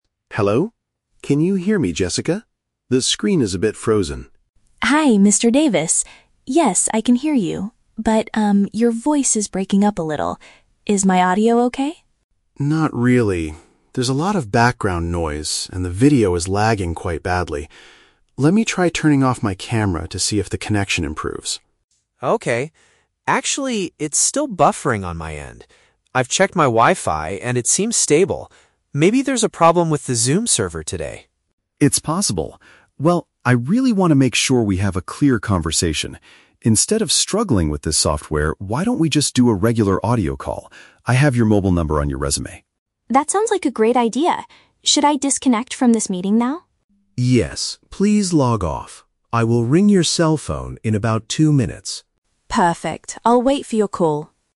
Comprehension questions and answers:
Listen to a conversation between an interviewer and a job applicant. Choose the correct answer (A, B, or C) for each question.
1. What does the interviewer try to do first to fix the problem?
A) He disables his video.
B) He checks his Wi-Fi router.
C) He restarts his computer.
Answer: He disables his video.

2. Why do they decide to stop using the video software?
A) The candidate forgot to turn on her microphone.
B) The software is experiencing delays and poor audio quality.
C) The interviewer cannot find the candidate's phone number.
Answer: The software is experiencing delays and poor audio quality.

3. What do the two speakers agree to do next?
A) Reschedule the interview for another day.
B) Log off and restart the Zoom application.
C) Continue the interview using a mobile phone.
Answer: Continue the interview using a mobile phone.

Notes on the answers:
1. The interviewer says, "Let me try turning off my camera." This is paraphrased as "disables his video."
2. The conversation describes "background noise," the video "lagging," and the screen "buffering." This means the software is experiencing delays and poor audio quality.
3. The interviewer suggests doing a "regular audio call" and says he will "ring your cell phone." This means they will continue using a mobile phone.

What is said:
Interviewer: Hello? Can you hear me, Jessica? The screen is a bit frozen.
Candidate: Hi, Mr. Davis. Yes, I can hear you, but um, your voice is breaking up a little. Is my audio okay?
Interviewer: Not really. There's a lot of background noise, and the video is lagging quite badly. Let me try turning off my camera to see if the connection improves.
Candidate: Okay... Actually, it's still buffering on my end. I've checked my Wi-Fi, and it seems stable. Maybe there's a problem with the Zoom server today.
Interviewer: It's possible. Well, I really want to make sure we have a clear conversation. Instead of struggling with this software, why don't we just do a regular audio call? I have your mobile number on your resume.
Candidate: That sounds like a great idea. Should I disconnect from this meeting now?
Interviewer: Yes, please log off. I will ring your cell phone in about two minutes.
Candidate: Perfect, I'll wait for your call.

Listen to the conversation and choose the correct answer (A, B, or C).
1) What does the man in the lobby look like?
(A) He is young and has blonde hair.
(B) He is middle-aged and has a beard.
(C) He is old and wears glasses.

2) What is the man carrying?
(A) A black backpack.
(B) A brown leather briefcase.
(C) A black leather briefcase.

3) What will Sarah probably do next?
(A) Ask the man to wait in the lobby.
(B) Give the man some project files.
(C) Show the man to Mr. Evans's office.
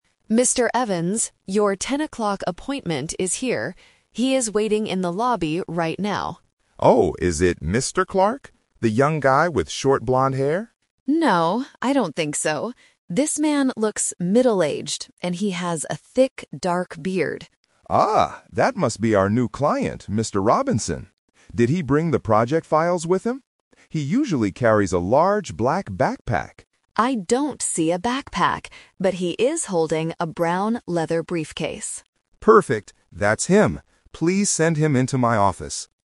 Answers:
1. He is middle-aged and has a beard.
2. A brown leather briefcase.
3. Show the man to Mr. Evans's office.

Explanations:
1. Sarah clearly describes the man: "This man looks middle-aged, and he has a thick dark beard." The Trap: Option (A) is a trap. Mr. Evans asks if it is the "young guy with short blonde hair" (Mr. Clark), but Sarah immediately says no. Option (C) is never mentioned.
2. Sarah says, "But he is holding a brown leather briefcase." The Trap: Option (A) is what Mr. Evans guessed because the client usually carries a black backpack, but he is not carrying it today. Option (C) mixes the color "black" (from the backpack) with the "briefcase" to confuse the listener.
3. At the end, Mr. Evans tells Sarah, "Please send him into my office." The Trap: Option (A) is a trap because the man is already waiting in the lobby, but the manager wants to see him now. Option (B) is a trap because "project files" are mentioned, but Sarah is not asked to give them to him.

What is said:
He is waiting in the lobby right now.
Mr. Evans: Oh, is it Mr. Clark? The young guy with short blonde hair?
Sarah: No, I don't think so. This man looks middle-aged, and he has a thick dark beard.
Mr. Evans: Ah, that must be our new client, Mr. Robinson. Did he bring the project files with him? He usually carries a large black backpack.
Sarah: I don't see a backpack. But he is holding a brown leather briefcase.

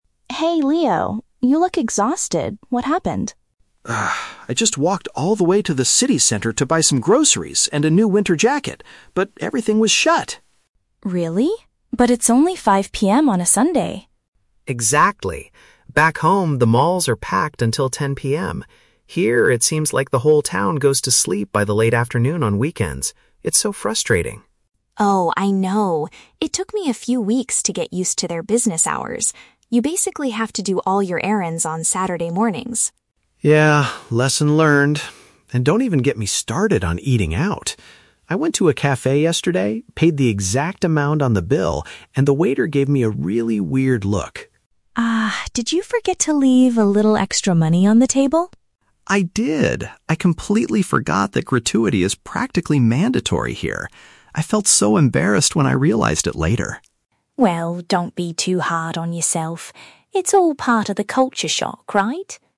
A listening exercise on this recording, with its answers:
Listen to the conversation between two international students from the same country. Read the questions below and choose the correct answer (A, B, or C) for each.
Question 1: Why is the man frustrated at the beginning of the conversation?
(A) He was unable to purchase his food and clothes.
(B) He got lost while walking to the city center.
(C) He was annoyed by the large crowds at the mall.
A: He was unable to purchase his food and clothes.

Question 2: What does the woman say about local shopping habits?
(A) People usually shop online to avoid the weekend rush.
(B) Customers should buy things early in the day on weekends.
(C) Stores are completely closed for the entire weekend.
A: Customers should buy things early in the day on weekends.

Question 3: Why did the waiter look at the man strangely at the cafe?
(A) He did not have enough cash to pay the bill.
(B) He complained about the quality of the drinks.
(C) He did not include an additional fee for the service.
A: He did not include an additional fee for the service.

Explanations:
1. The Key (Correct): Leo went to buy "groceries and a new winter jacket" (paraphrased as "food and clothes") but everything was "shut" (closed), meaning he was unable to purchase them. The Trap: Option (C) is incorrect. He mentions that back home the malls are "packed" (crowded), but he is not annoyed by crowds here; he is annoyed because the stores are closed. Not mentioned: Option (B) is a common problem for international students, but getting lost is never mentioned.
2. The Key (Correct): Maya advises that "You basically have to do all your errands on Saturday mornings." (Paraphrased: Saturday mornings = early in the day on weekends). The Trap: Option (C) is incorrect because the stores are not closed for the entire weekend, they just close early ("by the late afternoon on weekends"). Not mentioned: Option (A) is plausible in modern times, but shopping online is not discussed in the audio.
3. The Key (Correct): Leo forgot that "gratuity" (a tip) is mandatory, and Maya asks if he forgot to leave "a little extra money." (Paraphrased: gratuity/extra money = additional fee for the service). The Trap: Option (A) is incorrect. Leo says he "paid the exact amount on the bill," which means he had enough money for the food, just not the tip. Not mentioned: Option (B) is a plausible reason for a waiter to look strangely at a customer, but Leo never complained about the quality.

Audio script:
Maya: Hey, Leo. You look exhausted. What happened?
Leo: Ugh, I just walked all the way to the city center to buy some groceries and a new winter jacket, but everything was shut!
Maya: Really? But it's only 5 PM on a Sunday.
Leo: Exactly! Back home, the malls are packed until 10 PM. Here, it seems like the whole town goes to sleep by the late afternoon on weekends. It's so frustrating.
Maya: Oh, I know. It took me a few weeks to get used to their business hours. You basically have to do all your errands on Saturday mornings.
Leo: Yeah, lesson learned. And don't even get me started on eating out. I went to a cafe yesterday, paid the exact amount on the bill, and the waiter gave me a really weird look.
Maya: Ah... did you forget to leave a little extra money on the table?
Leo: I did! I completely forgot that gratuity is practically mandatory here. I felt so embarrassed when I realized it later.
Maya: Well, don't be too hard on yourself. It's all part of the culture shock, right?

